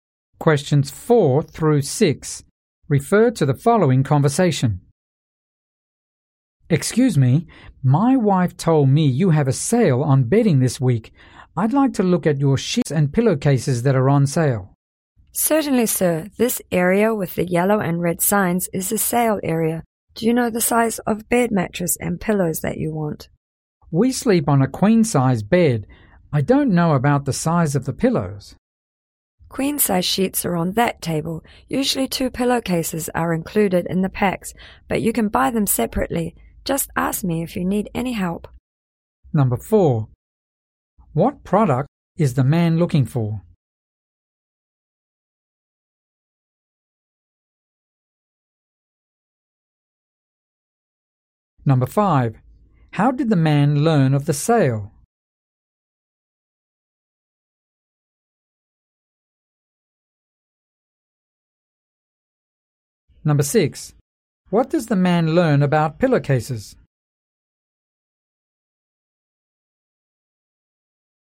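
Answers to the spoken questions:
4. Bedding: sheets and pillowcases on sale
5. His wife told him
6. Two are usually included in the sheet packs, but they can be bought separately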